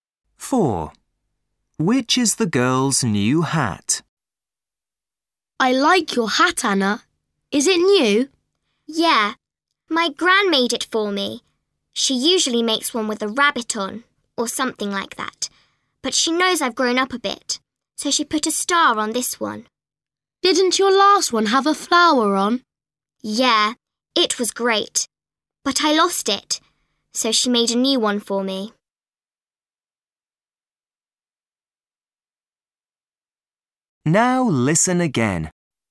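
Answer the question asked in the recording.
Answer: the one with a star on it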